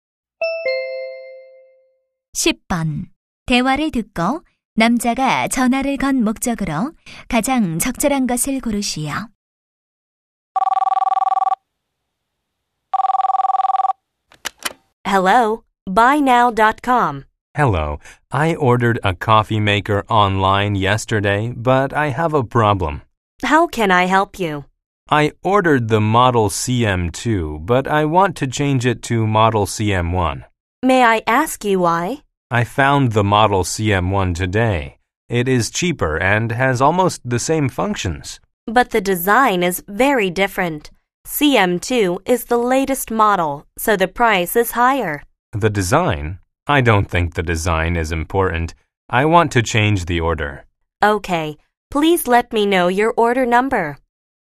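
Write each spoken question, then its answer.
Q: 대화를 듣고 남자가 전화를 건 목적으로 가장 적절한 것을 고르시오.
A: 주문한 제품 모델 변경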